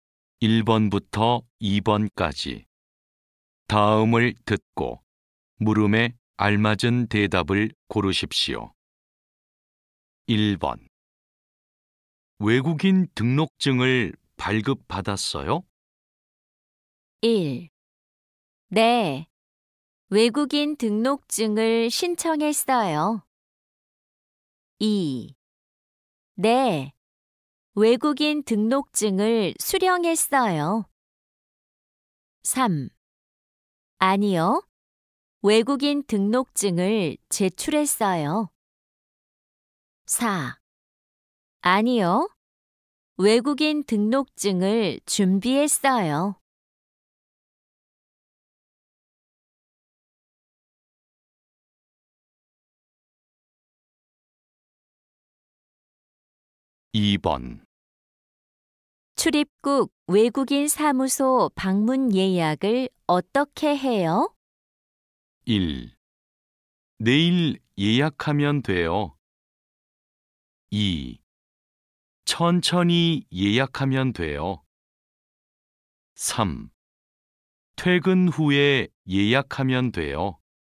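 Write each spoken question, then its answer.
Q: 외국인 등록증을 발급받았어요?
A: 2: 네. 외국인 등록증을 수령했어요.

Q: 출입국 외국인 사무소 방문 예약을 어떻게 해요?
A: 4: 인터넷으로 예약하면 돼요.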